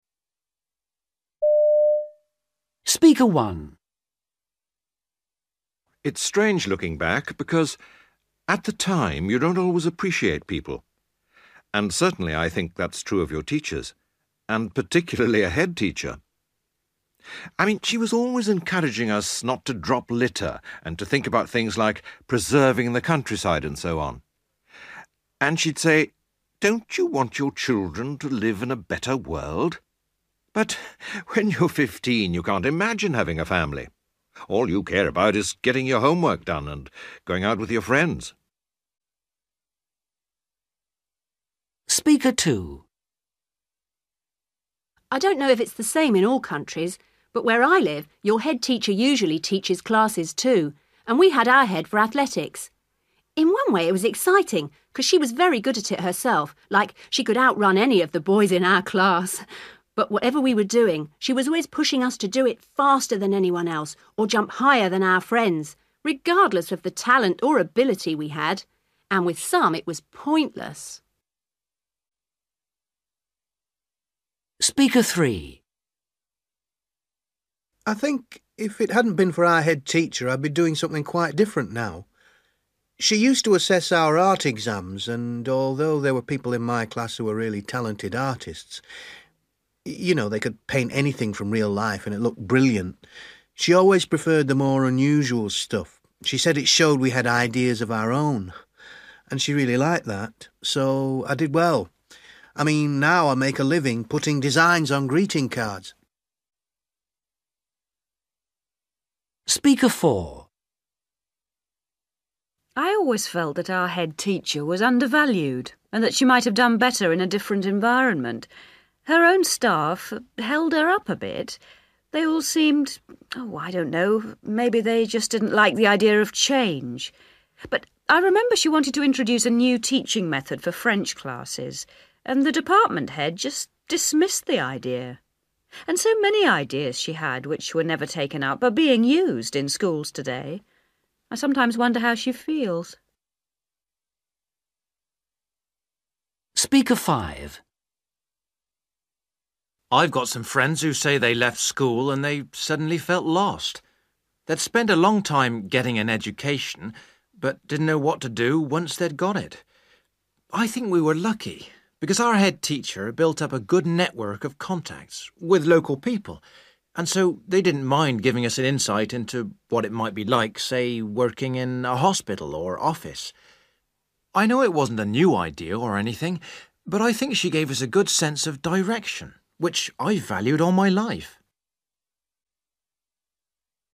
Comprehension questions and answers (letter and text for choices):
For questions 19-23, choose from the list (A-F) what each speaker is saying.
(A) She favoured the talented students.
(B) She prepared us for the real world.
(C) She encouraged us to be imaginative.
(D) She was ahead of her time.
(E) She was concerned about the environment.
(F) She encouraged competitiveness.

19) Speaker 1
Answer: (E) She was concerned about the environment.

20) Speaker 2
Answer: (F) She encouraged competitiveness.

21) Speaker 3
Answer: (C) She encouraged us to be imaginative.

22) Speaker 4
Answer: (D) She was ahead of her time.

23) Speaker 5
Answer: (B) She prepared us for the real world.

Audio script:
It's strange looking back because at the time you don't always appreciate people and certainly I think that's true of your teachers and particularly a head teacher. I mean she was always encouraging us not to drop litter and to think about things like preserving the countryside and so on, and she'd say, 'Don't you want your children to live in a better world?' But when you're fifteen, you can't imagine having a family – all you care about is getting your homework done and going out with your friends!
I don't know if it's the same in all countries, but where I live your head teacher usually teaches classes too and we had our head for athletics. In one way it was exciting 'cos she was very good at it herself, like she could out-run any of the boys in our class, but whatever we were doing she was always pushing us to do it faster than anyone else or jump higher than our friends regardless of the talent or ability we had – and with some it was pointless.
I think if it hadn't been for our head teacher, I'd be doing something quite different now. She used to assess our Art exams and although there were people in my class who were really talented artists ... you know, they could paint anything from real life and it looked brilliant ... she always preferred the more unusual stuff – she said it showed we had ideas of our own, and she really liked that, so, I did well. I mean, now I make a living putting designs on greeting cards.
I always felt that our head teacher was under-valued and that she might have done better in a different environment ... her own staff held her up a bit. They all seemed ... maybe they just didn't like the idea of change ... but I remember she wanted to introduce a new teaching method for French classes and the department head just dismissed the idea ... and so many ideas she had which were never taken up are being used in schools today. I sometimes wonder how she feels.
I've got some friends who say they left school and they suddenly felt lost. They'd spent a long time 'getting an education' but didn't know what to do once they'd got it. I think we were lucky because our head teacher built up a good network of contacts with local people and so they didn't mind giving us an insight into what it might be like, say, working in a hospital or office. I know it wasn't a new idea or anything but I think she gave us a good sense of direction which I've valued all my life.